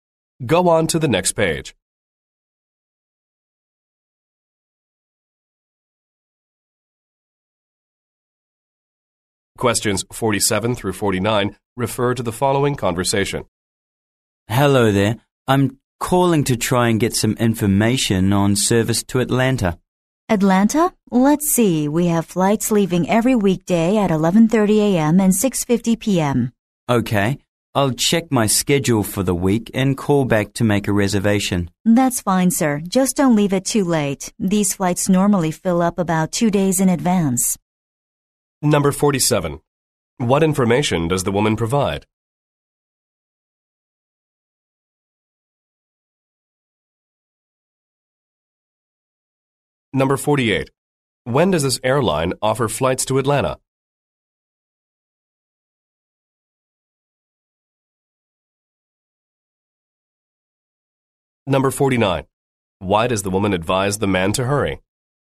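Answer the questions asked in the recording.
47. Flight times to Atlanta
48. Every weekday at 11:30 a.m. and 6:50 p.m.
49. The flights usually fill up about 2 days in advance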